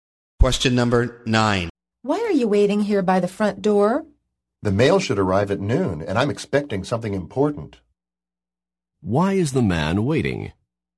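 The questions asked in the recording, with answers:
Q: Why is the man waiting?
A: He is expecting important mail at noon.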